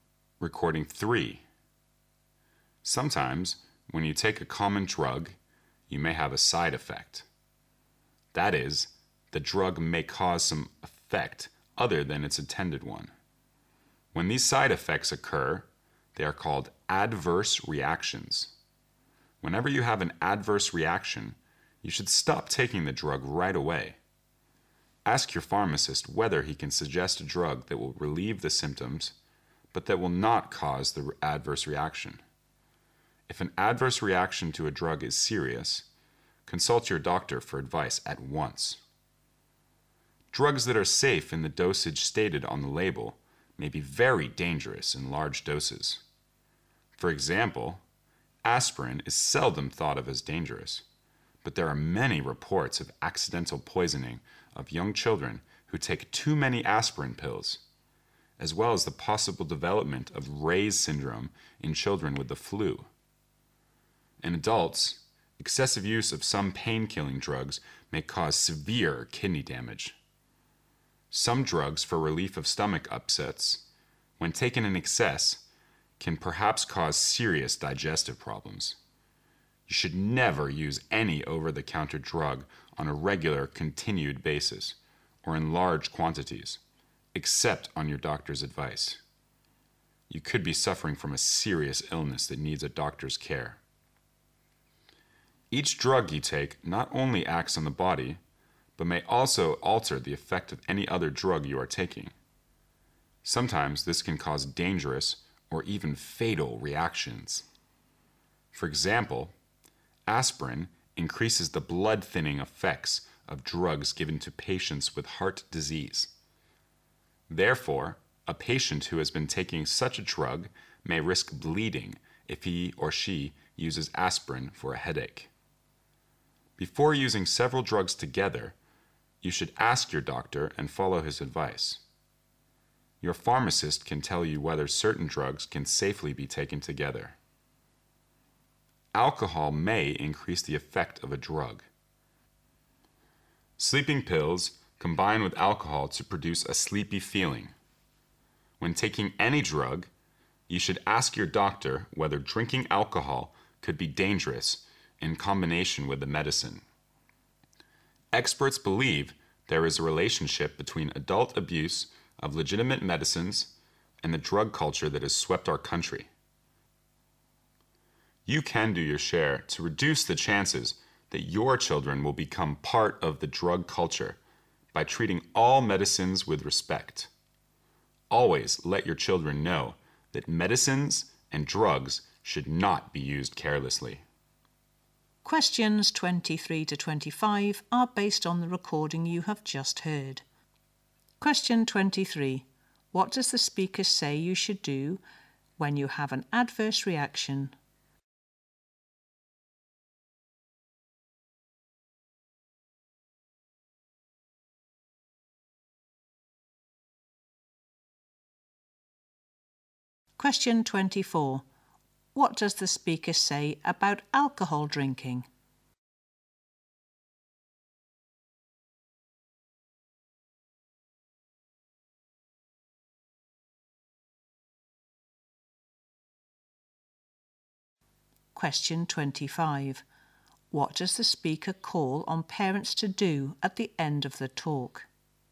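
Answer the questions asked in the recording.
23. Stop taking the drug right away
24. It may increase the effect of a drug
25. Treat all medicines with respect and teach children not to use drugs carelessly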